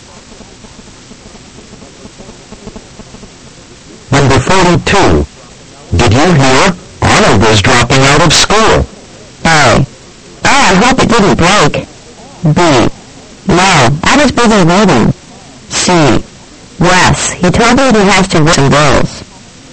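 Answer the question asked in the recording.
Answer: C: Yes, he told me he has to work some girls.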